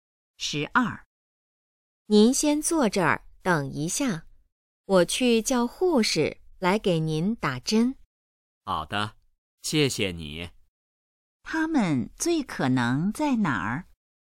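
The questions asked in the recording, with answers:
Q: 他们最可能在哪儿?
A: 医院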